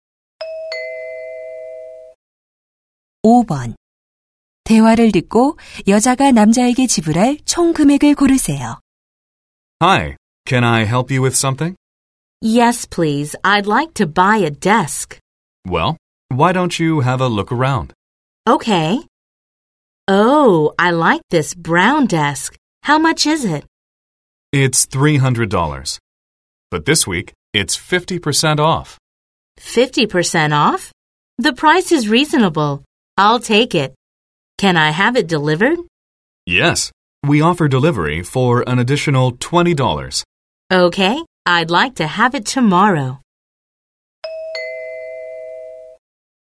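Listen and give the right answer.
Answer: 170달러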